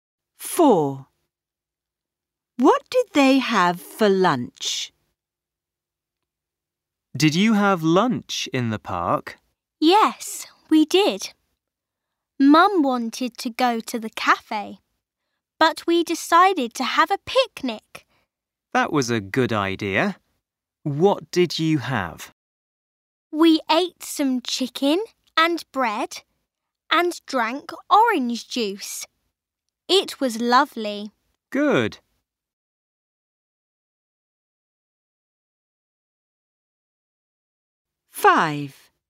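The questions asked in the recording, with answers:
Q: What did they have for lunch?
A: Chicken and bread, with orange juice (a picnic)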